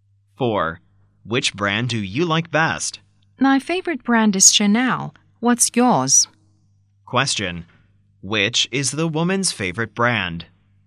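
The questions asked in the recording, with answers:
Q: Which is the woman's favorite brand?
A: Chanel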